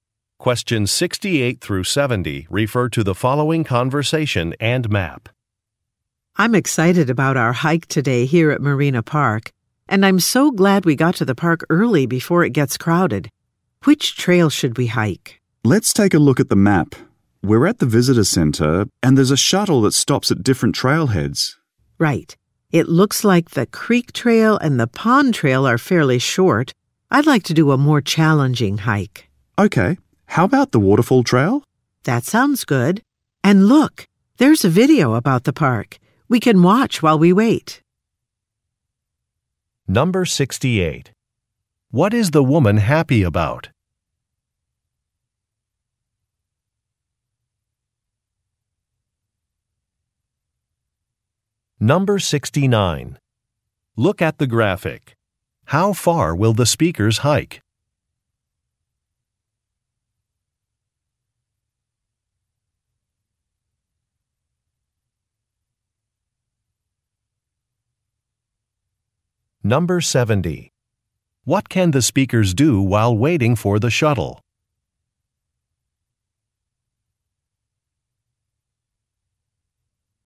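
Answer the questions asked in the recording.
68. They got to the park early before it gets crowded
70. Watch a video about the park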